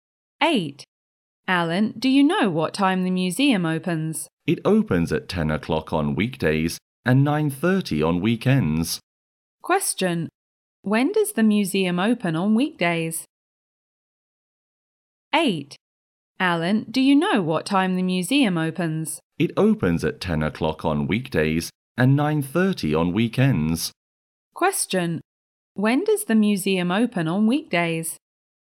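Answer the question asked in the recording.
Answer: At 10 o'clock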